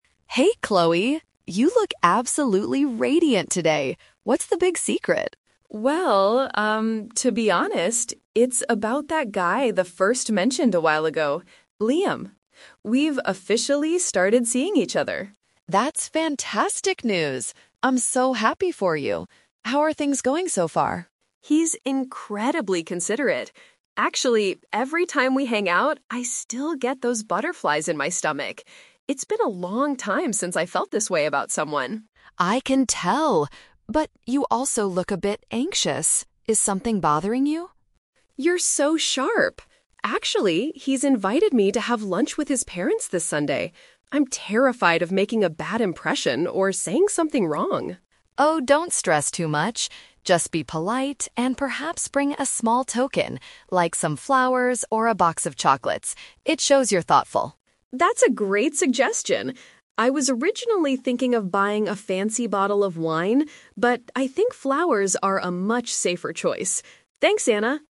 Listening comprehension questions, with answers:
Listen to the conversation between the two friends and choose the best answer (A, B, or C).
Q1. How does Chloe feel about her new relationship with Liam?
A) She is starting to feel bored with him.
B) She is very excited and happy.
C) She feels confused about her emotions.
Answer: B) She is very excited and happy.

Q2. What is Chloe's main concern regarding the upcoming weekend?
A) She doesn't know what to wear to the lunch.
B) She is worried about meeting Liam's family.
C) She thinks Liam's parents won't like the gift.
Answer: B) She is worried about meeting Liam's family.

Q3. What gift did Anna suggest for the meeting?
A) An expensive bottle of wine.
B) A bouquet of flowers.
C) A home-cooked meal.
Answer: B) A bouquet of flowers.

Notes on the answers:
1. Chloe mentions she gets "butterflies in my stomach" and hasn't felt this way in a long time. In English, having "butterflies" in this context means being excited and nervous in a positive way about a romantic interest.
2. Chloe says she is "terrified of making a bad impression" because she is having lunch with his parents. Paraphrasing: "parents" = "family".
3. Anna suggests bringing "some flowers or a box of chocolates." Chloe agrees that flowers are a "safer choice."

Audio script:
Anna: Hey, Chloe! You look absolutely radiant today. What's the big secret?
Chloe: Well, um, to be honest, it's about that guy I mentioned a while ago—Liam. We've officially started seeing each other.
Anna: That's fantastic news! I'm so happy for you. How are things going so far?
Chloe: He's incredibly considerate. Actually, every time we hang out, I still get those butterflies in my stomach. It's been a long time since I felt this way about someone.
Anna: I can tell! But... you also look a bit anxious. Is something bothering you?
Chloe: You're so sharp! Actually, he's invited me to have lunch with his parents this Sunday. I'm terrified of making a bad impression or saying something wrong.
Anna: Oh, don't stress too much. Just be polite and perhaps bring a small token, like some flowers or a box of chocolates. It shows you're thoughtful.
Chloe: That's a great suggestion. I was originally thinking of buying a fancy bottle of wine, but I think flowers are a much safer choice. Thanks, Anna!

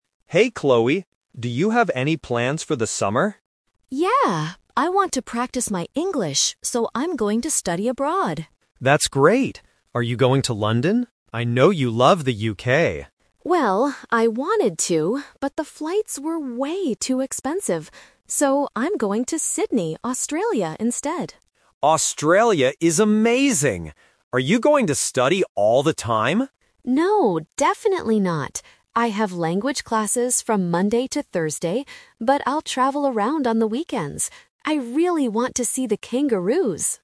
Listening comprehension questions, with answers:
Listen to the conversation and circle the correct answer (A, B, or C).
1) Where is Chloe going this summer?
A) London, the UK.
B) Sydney, Australia.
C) New York, the USA.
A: B) Sydney, Australia.

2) Why didn't Chloe choose her first option?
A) Because she doesn't like the UK.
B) Because she couldn't find a good school.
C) Because the plane tickets cost too much.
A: C) Because the plane tickets cost too much.

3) What will Chloe do on the weekends?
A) She will travel around.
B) She will study for her English classes.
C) She will visit her family.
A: A) She will travel around.

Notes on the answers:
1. Chloe clearly says her final decision: "So, I'm going to Sydney, Australia instead."
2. Chloe explains her reason for not going to London: "but the flights were way too expensive." (Plane tickets = flights).
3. Chloe states her weekend plans clearly: "...but I'll travel around on the weekends."

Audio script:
Ben: Hey Chloe! Do you have any plans for the summer?
Chloe: Yeah! I want to practice my English, so I'm going to study abroad.
Ben: That's great! Are you going to London? I know you love the UK.
Chloe: Well, I wanted to, but the flights were way too expensive. So, I'm going to Sydney, Australia instead.
Ben: Australia is amazing! Are you going to study all the time?
Chloe: No, definitely not. I have language classes from Monday to Thursday, but I'll travel around on the weekends. I really want to see the kangaroos!

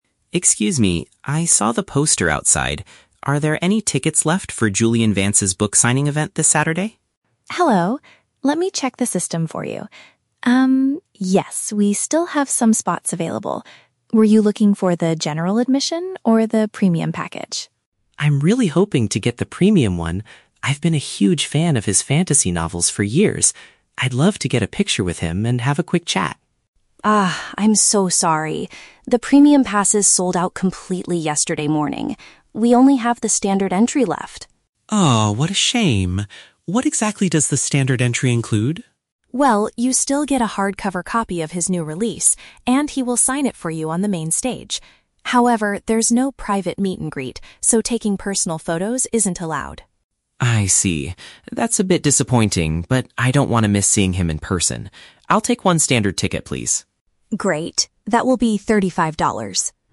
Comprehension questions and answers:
Listen to a conversation between a fan and a bookstore employee. Choose the correct answer (A, B, or C) for each question.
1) What kind of experience did the customer originally want to buy?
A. A basic ticket to listen to the author read on the main stage.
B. An exclusive pass to take a photo and talk with the writer.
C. A special reservation to attend a private dinner with the author.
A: B. An exclusive pass to take a photo and talk with the writer.

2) Why can't the customer get the ticket they wanted?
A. All the top-tier tickets have already been purchased by others.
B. The author suddenly canceled the event yesterday morning.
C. The bookstore is only selling event tickets on their website.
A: A. All the top-tier tickets have already been purchased by others.

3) What does the standard ticket actually provide?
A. A chance to talk to the author privately for a few minutes.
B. A large poster featuring the cover of the new fantasy novel.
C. A physical book with the writer's signature on it.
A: C. A physical book with the writer's signature on it.

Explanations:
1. The fan wanted the "premium" package because they would "love to get a picture with him and have a quick chat" (which paraphrases to taking a photo and talking with the writer). Why the traps are wrong: (A) is a trap. The "main stage" is mentioned as part of the standard ticket, but this is not what the fan originally wanted. (C) is a plausible celebrity event activity, but a private dinner is never mentioned in the audio.
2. The employee states that the premium passes "sold out completely" (which means all top-tier tickets have already been purchased). Why the traps are wrong: (B) is a trap. "Yesterday morning" is mentioned, but that is when the tickets sold out, not when the event was canceled (the event is still happening). (C) is a plausible bookstore policy, but it is unmentioned.
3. The employee explains that with a standard entry, you "get a hardcover copy... and he will sign it for you" (which paraphrases to a physical book with the writer's signature). Why the traps are wrong: (A) is a trap. Talking privately is part of the "private meet-and-greet," which the employee explicitly says is not included in the standard ticket. (B) is a trap. A "poster" is mentioned at the very beginning of the audio, and "fantasy novels" are mentioned, but customers do not receive a poster.

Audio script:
Fan: Excuse me, I saw the poster outside. Are there any tickets left for Julian Vance's book signing event this Saturday?
Employee: Hello! Let me check the system for you. Um, yes, we still have some spots available. Were you looking for the general admission or the premium package?
Fan: I'm really hoping to get the premium one. I've been a huge fan of his fantasy novels for years. I'd love to get a picture with him and have a quick chat.
Employee: Ah, I'm so sorry. The premium passes sold out completely yesterday morning. We only have the standard entry left.
Fan: Oh, what a shame. What exactly does the standard entry include?
Employee: Well, you still get a hardcover copy of his new release, and he will sign it for you on the main stage. However, there's no private meet-and-greet, so taking personal photos isn't allowed.
Fan: I see. That's a bit disappointing, but I don't want to miss seeing him in person. I'll take one standard ticket, please.

